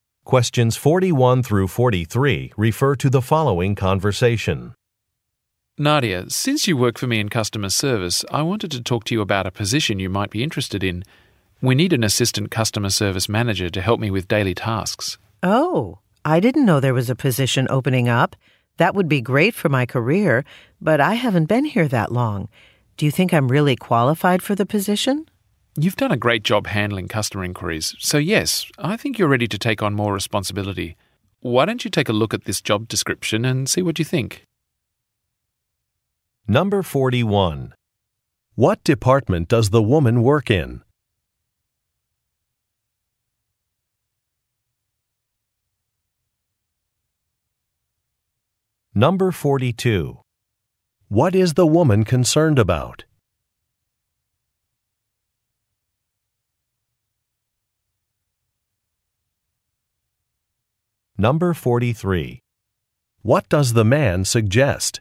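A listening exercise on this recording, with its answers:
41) What department does the woman work in?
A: Customer Service

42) What is the woman concerned about?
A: Her qualifications for a position

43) What does the man suggest?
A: Looking at a job description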